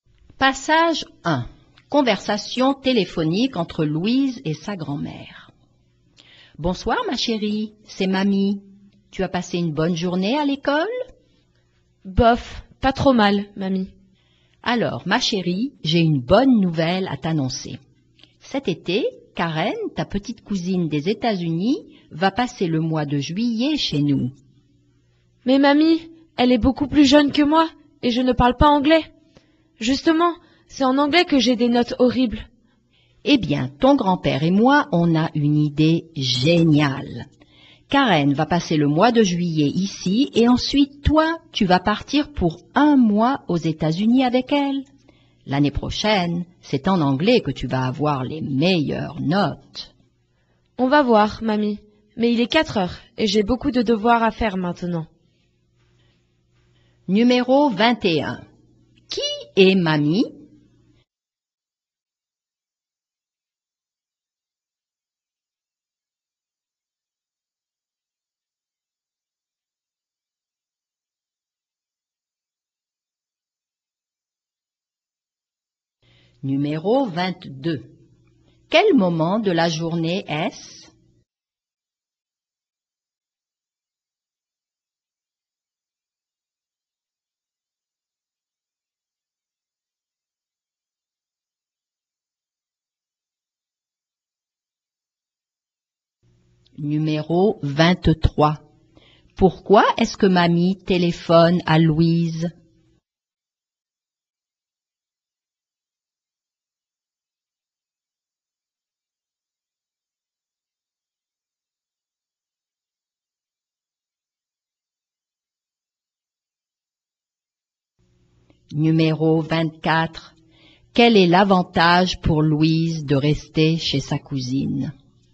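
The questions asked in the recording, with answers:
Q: Qui est Mamie?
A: La grand-mère de Louise

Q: Pourquoi est-ce que mamie téléphone à Louise?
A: Pour annoncer que sa cousine Karen va passer juillet chez eux

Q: Quel est l'avantage pour Louise de rester chez sa cousine?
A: Elle va améliorer son anglais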